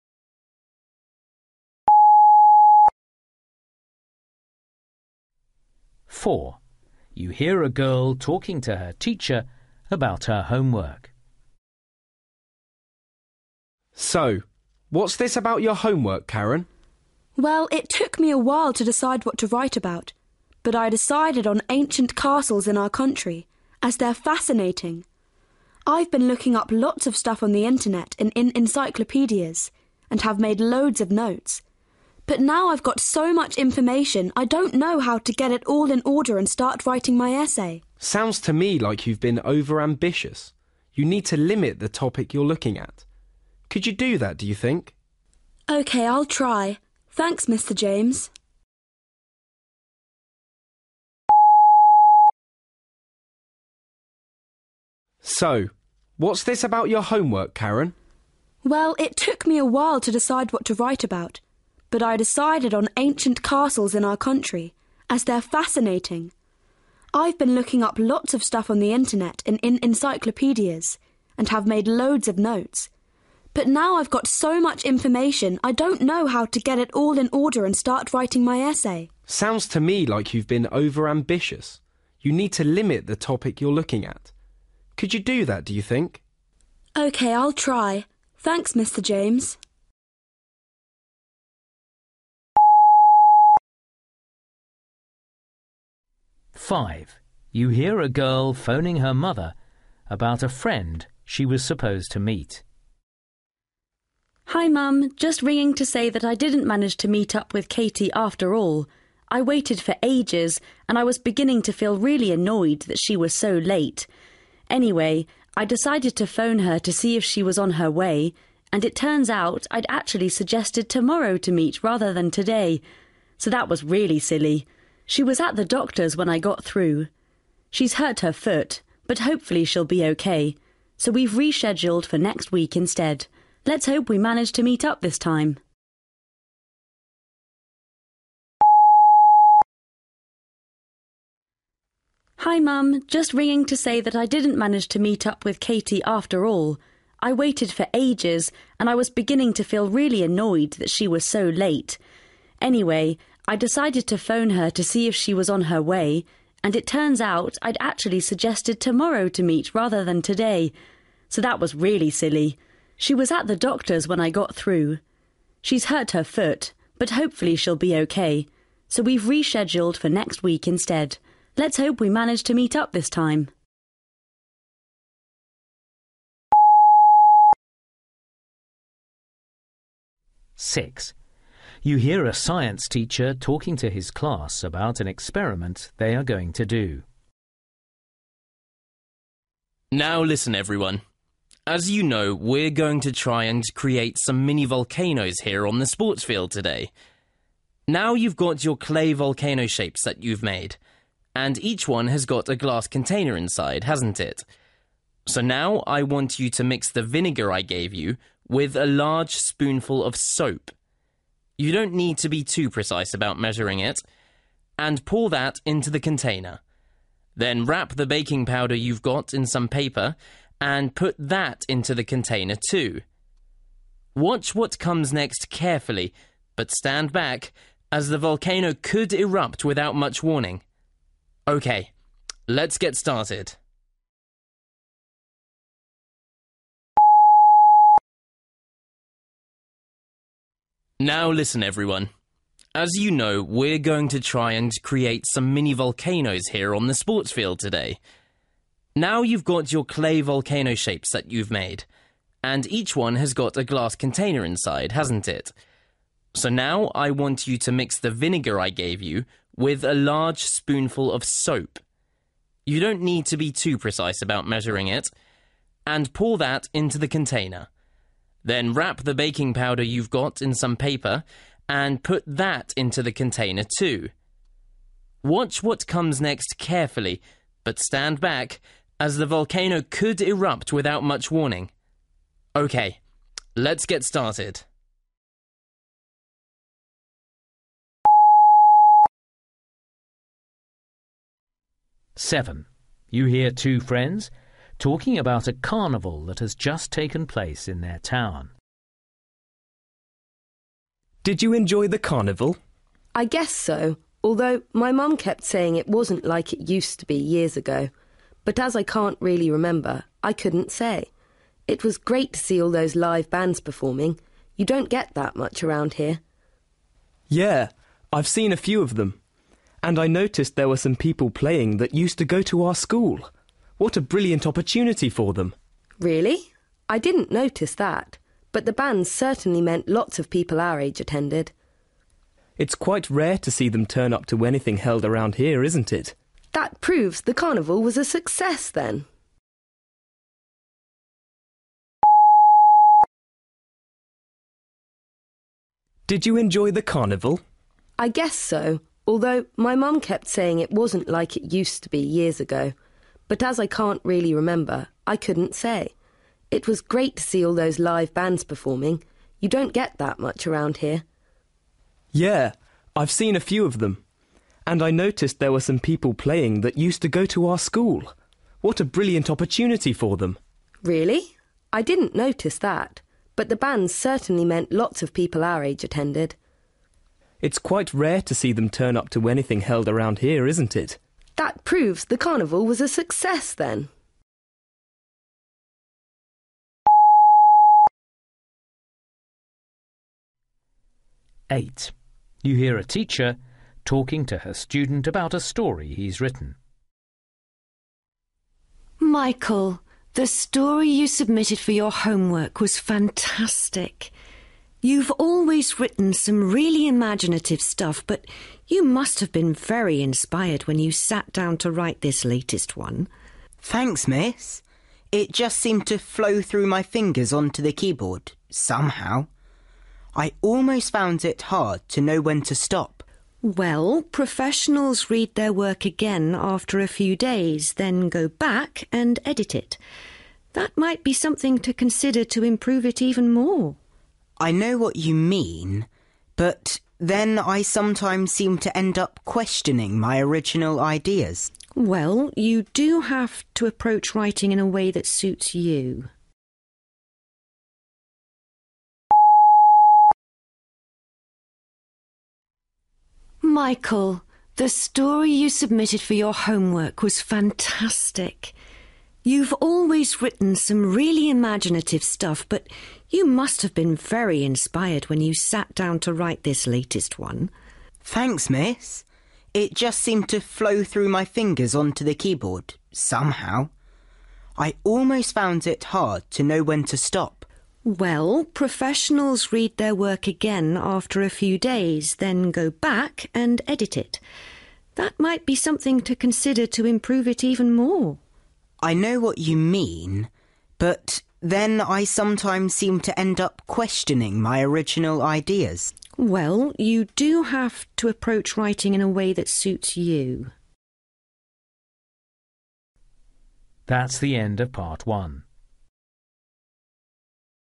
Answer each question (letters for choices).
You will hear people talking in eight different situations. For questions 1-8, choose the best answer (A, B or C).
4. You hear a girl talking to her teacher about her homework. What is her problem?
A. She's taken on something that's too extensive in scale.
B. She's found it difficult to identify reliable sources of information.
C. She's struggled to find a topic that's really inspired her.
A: A

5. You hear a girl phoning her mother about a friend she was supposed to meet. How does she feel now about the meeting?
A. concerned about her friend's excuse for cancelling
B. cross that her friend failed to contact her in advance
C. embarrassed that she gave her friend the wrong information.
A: C

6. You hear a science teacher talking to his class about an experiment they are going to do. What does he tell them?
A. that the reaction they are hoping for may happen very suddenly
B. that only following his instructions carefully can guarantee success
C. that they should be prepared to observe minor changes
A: A

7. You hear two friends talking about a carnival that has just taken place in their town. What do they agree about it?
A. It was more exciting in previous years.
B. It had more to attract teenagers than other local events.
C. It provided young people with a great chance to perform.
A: B

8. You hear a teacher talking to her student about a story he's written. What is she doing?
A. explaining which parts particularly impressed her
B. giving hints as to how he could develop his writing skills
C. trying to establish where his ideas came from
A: B

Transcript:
I'm currently performing as a character who's my opposite in every sense and that creates lots of challenges for me. It's a difficult part of the job as I have to think and behave in a completely unfamiliar way. But it's absolutely worth it when it all comes together on stage!
Mr James: So what's this about your homework, Karen?
Karen: Well, it took me a while to decide what to write about, but I decided on ancient castles in our country, as they're fascinating. I've been looking up lots of stuff on the internet and in encyclopaedias, and have made loads of notes, but now I've just got so much information I don't know how to get it all in order and start writing my essay.
Mr James: Sounds to me like you've been overambitious. You need to limit the topic you're looking at. Could you do that, do you think?
Karen: OK, I'll try. Thanks, Mr James.
5
Martha: Hi Mum. Just ringing to say what I didn't manage to meet up with Katie after all. I waited for ages, and I was beginning to feel really annoyed that she was so late. Anyway, I decided to phone her to see if she was on her way – and it turns out I'd actually suggested tomorrow to meet rather than today! So that was really silly. She was at the doctor's when I got through – she's hurt her foot, but hopefully she'll be OK, so we've rescheduled for next week instead. Let's hope we manage to meet up this time!
Now listen everyone. As you know, we're going to try and create some mini-volcanoes here on the sports field today! Now you've got your clay volcano shapes that you've made, and each one has got a glass container inside, hasn't it? So now I want you to mix the vinegar I gave you with a large spoonful of soap – you don't need to be too precise about measuring it – and pour that into the container. Then wrap the baking powder you've got in some paper, and put that into the container too. Watch what comes next carefully, but stand back, as the volcano could erupt without much warning. OK, let's get started.
Paul: Did you enjoy the carnival?
Keeley: I guess so – although my mum kept saying that it wasn't like it used to be years ago. But as I can't really remember, I couldn't say! It was great to see all those live bands performing – you don't get that much around here.
Paul: Yeah, I've seen a few of them. And I noticed there were some people playing that used to go to our school. What a brilliant opportunity for them!
Keeley: Really? I didn't notice that. But the bands certainly meant lots of people our age attended.
Paul: It's quite rare to see them turn up to anything held around here, isn't it?
Keeley: That proves the carnival was a success then!
Miss Carter: Michael, the story you submitted for your homework was fantastic! You're always written some really imaginative stuff, but you must have been very inspired when you sat down to write this latest one.
Michael: Thanks, Miss. It just seemed to flow through my fingers onto the keyboard, somehow. I almost found it hard to know when to stop!
Miss Carter: Well, professionals read their work again after a few days, then go back and edit it. That might be something to consider to improve it even more?
Michael: I know what you mean, but then I sometimes seem to end up questioning my original ideas.
Miss Carter: Well, you do have to approach writing in a way that suits you ...